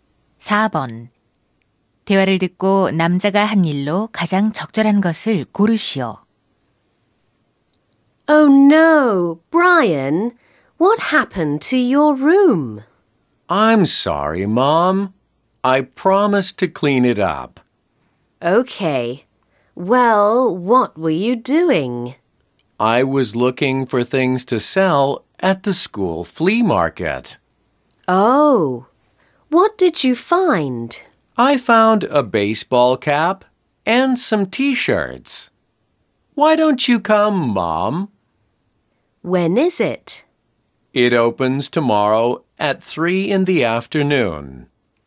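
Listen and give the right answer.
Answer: 벼룩시장에 팔 물건 찾기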